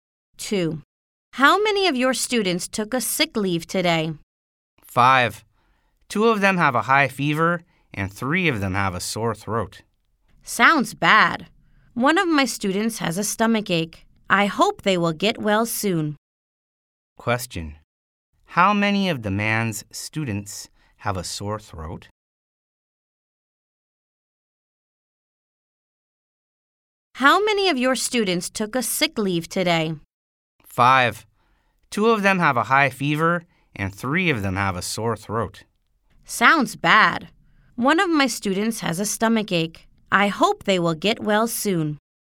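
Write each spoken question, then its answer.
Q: How many of the man's students have a sore throat?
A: Three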